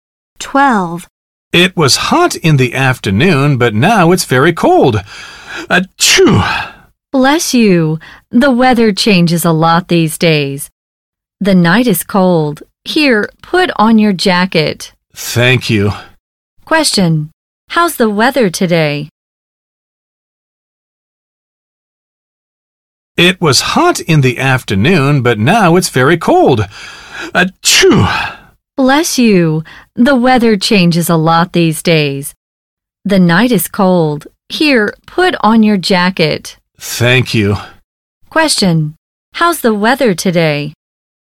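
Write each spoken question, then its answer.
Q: How's the weather today?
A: Hot in the afternoon, very cold at night; it changes a lot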